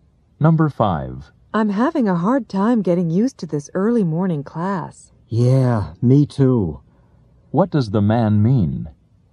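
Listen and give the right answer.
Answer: He is also having trouble getting used to the early morning class.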